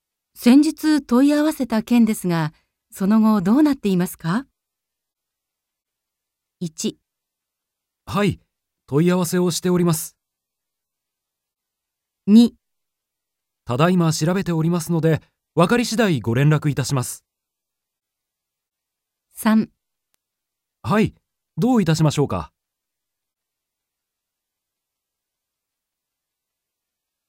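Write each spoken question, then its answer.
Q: 先日問い合わせた件ですが、その後どうなっていますか?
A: 2: ただいま調べておりますので、分かり次第ご連絡いたします。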